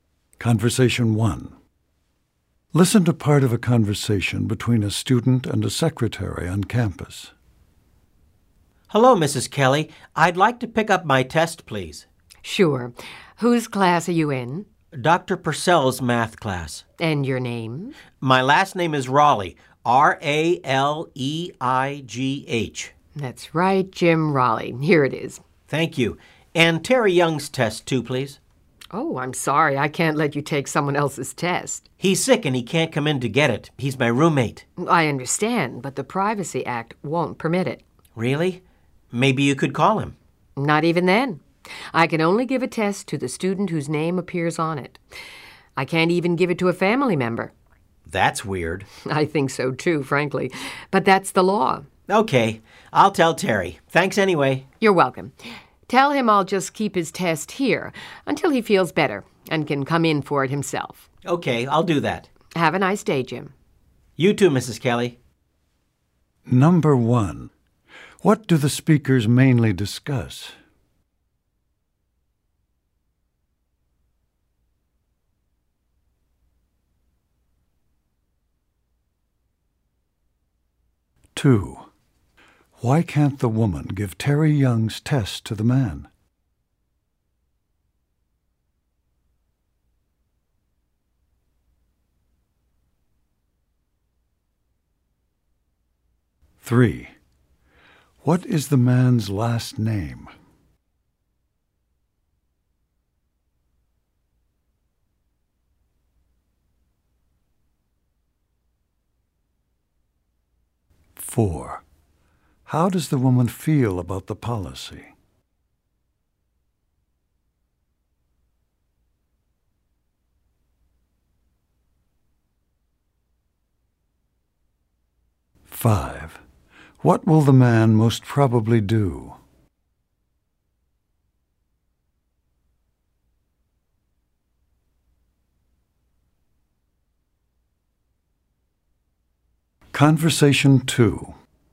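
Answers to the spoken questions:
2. The Privacy Act does not permit it
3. Raleigh
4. She thinks it is weird too
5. Tell Terry to come in for his test himself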